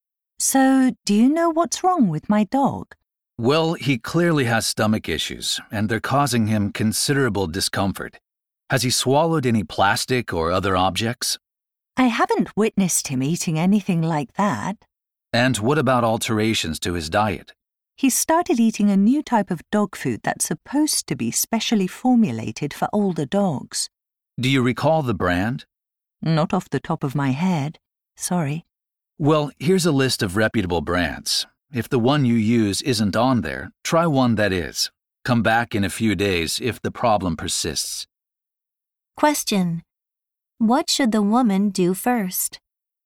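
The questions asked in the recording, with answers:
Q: What should the woman do first?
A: Check whether her dog food brand is on the vet's list of reputable brands, and switch to one that is if it isn't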